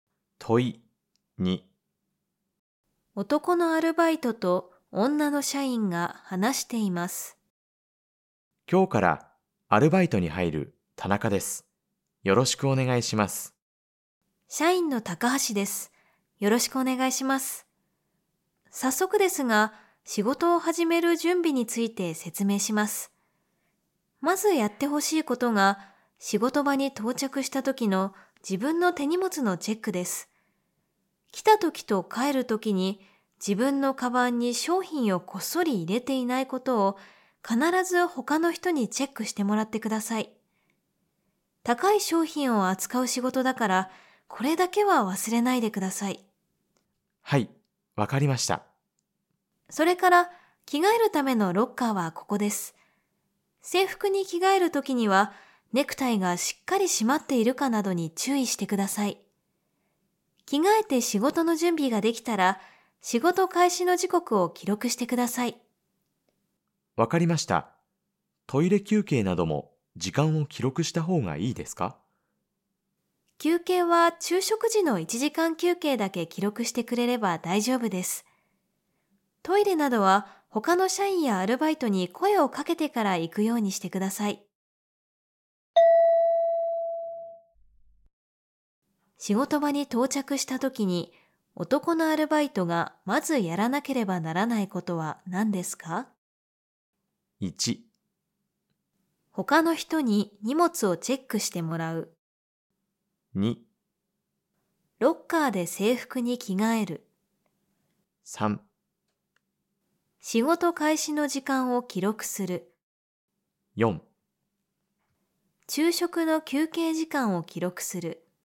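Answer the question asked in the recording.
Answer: 1: 他の人に荷物をチェックしてもらう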